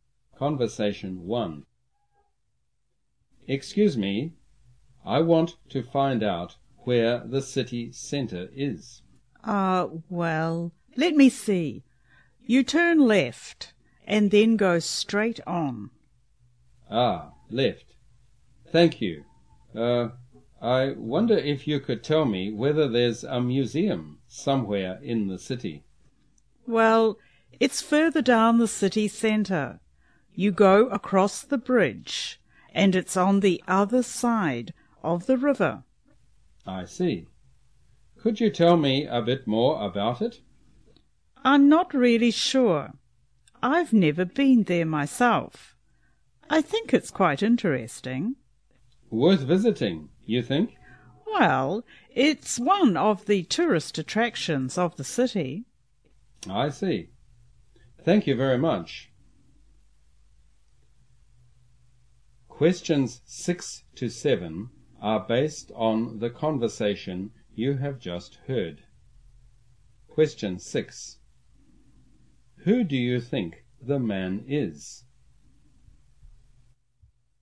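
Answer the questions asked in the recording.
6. A visitor to the city
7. It is a tourist attraction worth visiting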